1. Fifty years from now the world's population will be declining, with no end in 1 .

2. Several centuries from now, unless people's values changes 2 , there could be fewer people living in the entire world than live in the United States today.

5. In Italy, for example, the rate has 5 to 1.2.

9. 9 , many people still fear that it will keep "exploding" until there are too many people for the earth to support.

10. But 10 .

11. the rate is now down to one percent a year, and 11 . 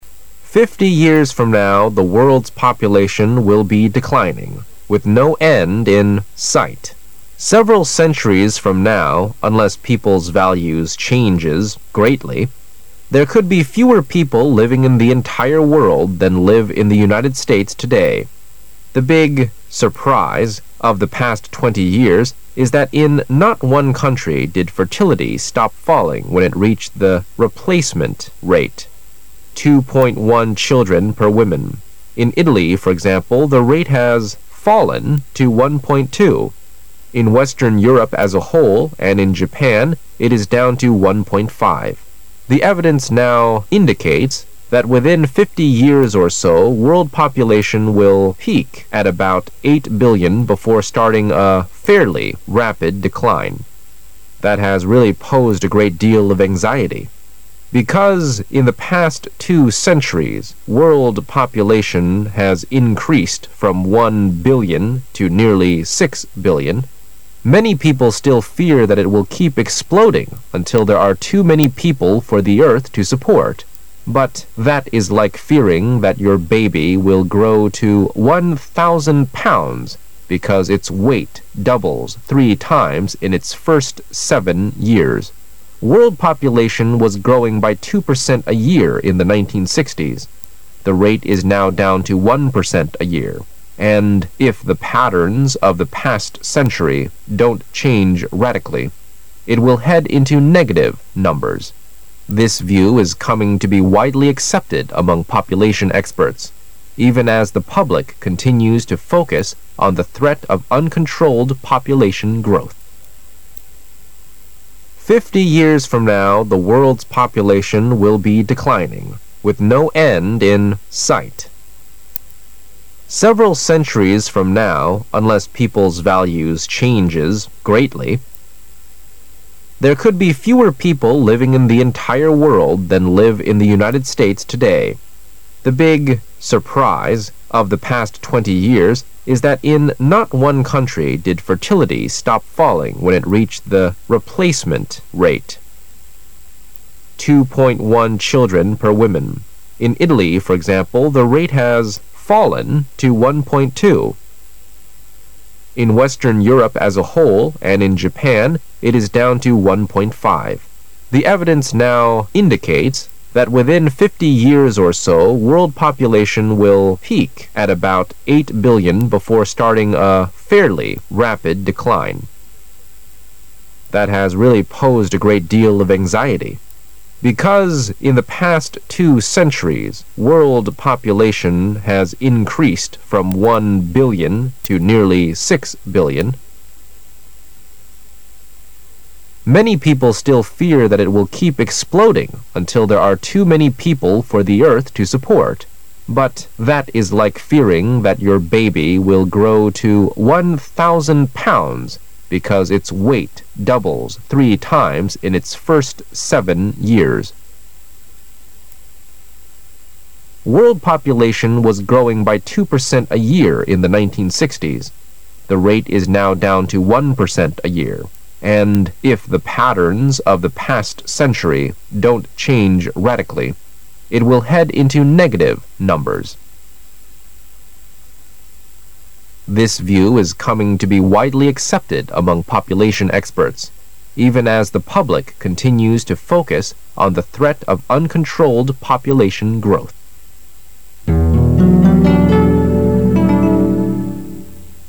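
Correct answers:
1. sight
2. greatly
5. fallen
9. Because in the past two centuries world population has increased from one billion to nearly six billion
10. that is like fearing that your baby will grow to 1,000 pounds because its weight doubles three times in its first seven years
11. if the patterns of the past century don't change radically,it will head into negative numbers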